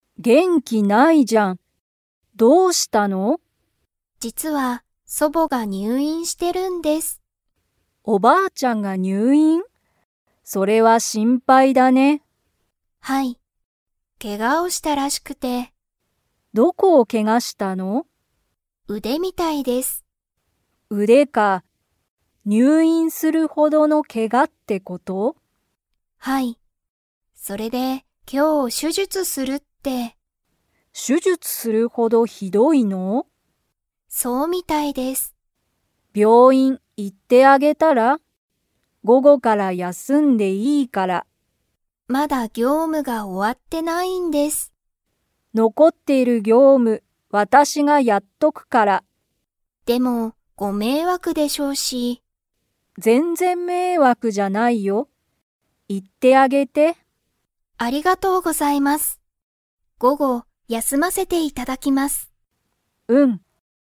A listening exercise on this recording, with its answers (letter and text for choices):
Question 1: リサの祖母そぼは、 で入院にゅういんしている。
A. 病気びょうき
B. けが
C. 業務ぎょうむ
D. 元気げんき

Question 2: リサは、午後ごごから休やすみますか?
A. はい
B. いいえ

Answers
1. B. けが
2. A. はい

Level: Level 4